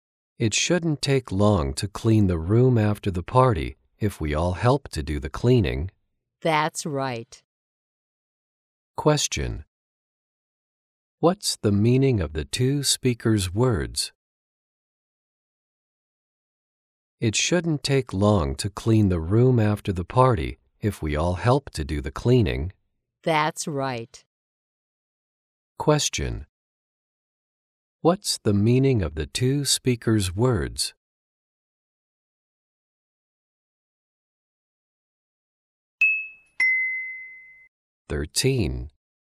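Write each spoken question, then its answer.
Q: Question. What's the meaning of the two speakers' words?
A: Cleaning the room won't take long if everyone helps.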